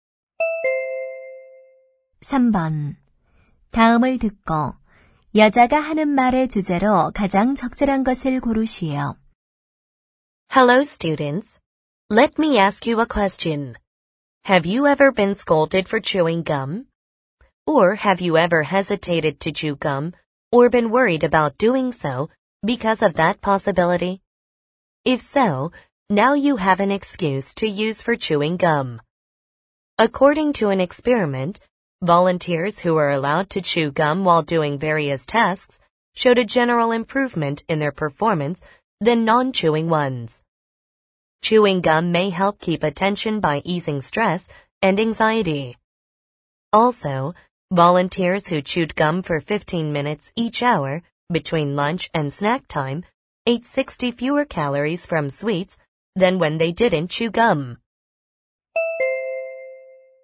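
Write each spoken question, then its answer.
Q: 다음을 듣고 여자가 하는 말의 주제로 가장 적절한 것을 고르시오.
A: 껌 씹기의 장점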